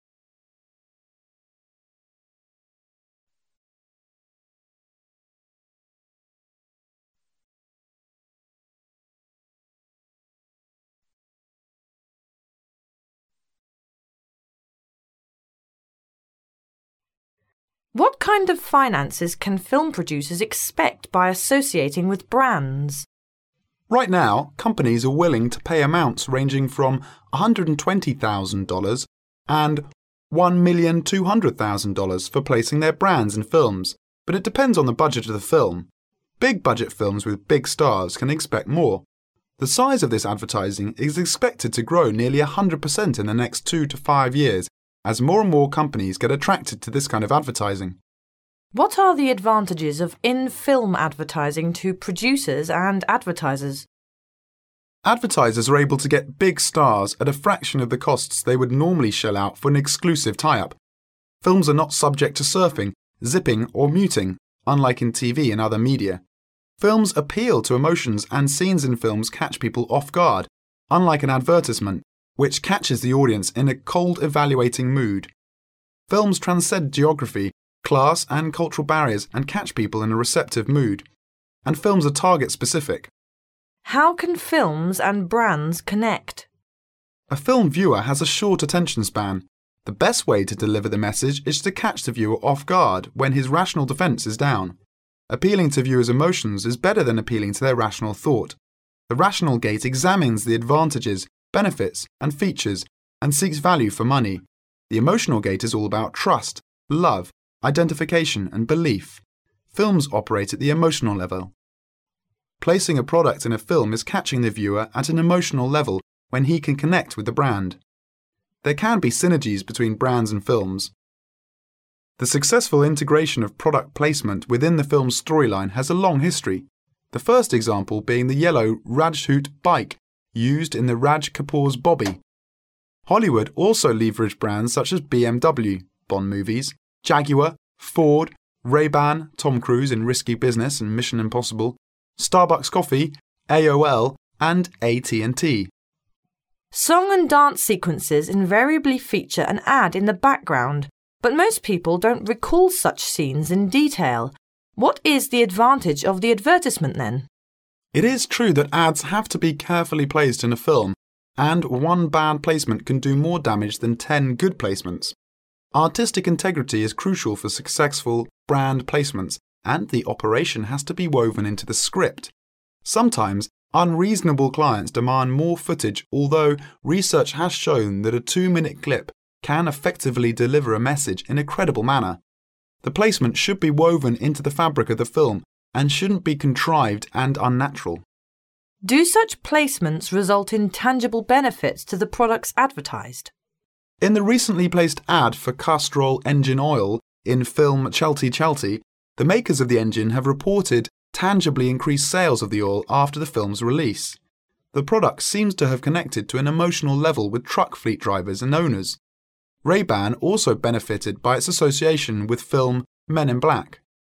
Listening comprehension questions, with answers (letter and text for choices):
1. What is true about film producer's placing brands in films?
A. It depends on the budget of the film.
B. Companies are usually willing to pay $1,200,000 for placing their brands in films.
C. Companies are usually willing to pay $120,000 for placing their brands in films.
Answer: A. It depends on the budget of the film.

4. What is true about the rational gate and emotional gate?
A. The emotional gate is all about trust, love, identification and benefits.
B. The rational gate examines the advantages, belief and features, and seeks value for money.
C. The emotional gate is all about trust, love, identification and belief.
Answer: C. The emotional gate is all about trust, love, identification and belief.

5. At what level do films operate?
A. Films operate at the rational level.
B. Films operate at the emotional level.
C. Films operate at the cold-evaluating level.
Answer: B. Films operate at the emotional level.

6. Which of the following is not mentioned for successful integration of product placement within the film's storyline?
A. Yellow Rajdhoot bike used in Raj Kapoor's Bobby.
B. BMW (Bond movies).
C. Benz.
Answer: C. Benz.

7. What is important for successful brand placements?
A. Artistic integrity.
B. The operation.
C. Song-and-dance sequences.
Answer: A. Artistic integrity.

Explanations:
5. 听力原文中提到Films operate at the emotional level,故答案为B。
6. 此题可采用排除法,听力原文中提到若干商标名.在材料出没有出现的即为答案]故此题选择C。
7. 此题是对文章细节的提问,听力材料中提到:Artistic integrity is crucial for successful brand placements,故答案为A。

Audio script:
A
[解析] 23-30 Woman: What kind of finances can film producers expect by associating with brands? Man: Right now, companies are willing to pay amounts ranging between $120,000 and $1,200,000. for placing their brands in films, but it depends on the budget of the film. Big-budget films with big stars can expect more. The size of this advertising is expected to grow nearly 100 percent in the next two to five years as more and more companies get attracted to this kind of advertising. Woman: What are the advantages of in-film advertising to producers and advertisers? Man: Advertisers are able to get big stars at a fraction of the costs they would normally shell out for an exclusive tie-up. Films are not subject to surfing, zipping or muting (unlike in TV and other media). Films appeal to emotions and scenes in films catch people off-guard unlike an advertisement, which catches the audience in a cold-evaluating mood. Films transcend geography, class and cultural barriers and catch people in a receptive moo& And films are target-specific. Woman: How can films and brands connect? Man: A film-viewer bas a short attention span. The best way to deliver the message is to catch the viewer off-guard when his rational defense is down. Appealing to viewers' emotions is better than appealing to their rational thought. The rational gate examines the advantages, benefits and features, and seeks value for money; the emotional gate is all about trust, love, identification and belief. Films operate at the emotional level Placing a product in a film is catching the viewer at an emotional level when he can connect with the brand. There can be synergies between brands and films. The successful integration of product placement within the film's storyline has a long history-the first example being the yellow Rajdhoot bike used in Raj Kapoor's Bobby. Hollywood also leveraged brands such as BMW (Bond movies), Jaguar, Ford, Ray Ban (Tom Cruise in Risky Business and Mission Impossible), Starbucks coffee, AOL and AT&T. Wan: Song-and-dance sequences invariably feature an ad in the background but most people don't recall such scenes in detail What is the advantage of the advertisement then? Woman: It is true that ads have to be carefully placed in a film and one bad placement can do more damage than 10 good placements. Artistic integrity is crucial for successful brand placements and the operation has to be woven into the script. Sometimes, unreasonable clients demand more footage although research has shown that a two-minute clip can effectively deliver a message in a credible manner. The placement should be woven into the fabric of the film and shouldn't be contrived and unnatural. Wan: Do such placements result in tangible benefits to the products advertised? Woman: In the recently placed ad for Castrol engine oil in film Cbalte Cbalte, the makers of the engine have reported tangibly increased sales of the oil after the film's release. The product seems to have connected on an emotional level with truck fleet drivers and owners. Ray Ban also benefited by its association with film Men in Black.